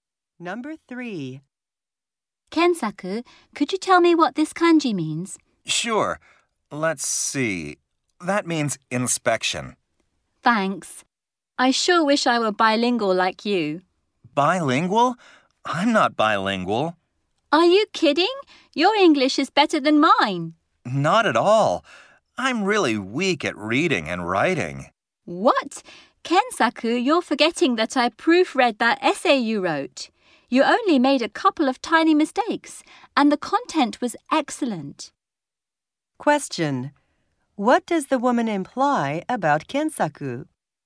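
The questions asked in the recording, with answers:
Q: What does the woman imply about Kensaku?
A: He underestimates his English reading and writing, which are very good.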